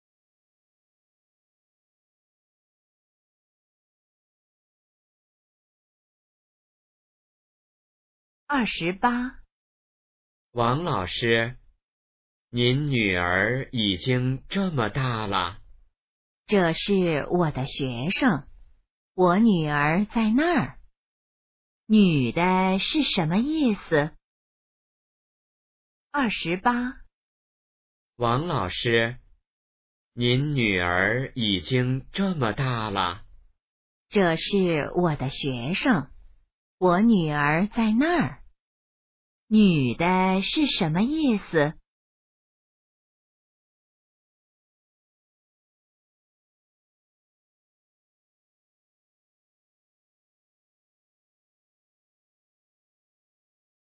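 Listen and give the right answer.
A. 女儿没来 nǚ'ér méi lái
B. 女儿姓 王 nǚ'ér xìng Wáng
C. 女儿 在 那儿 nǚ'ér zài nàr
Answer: C. 女儿 在 那儿 nǚ'ér zài nàr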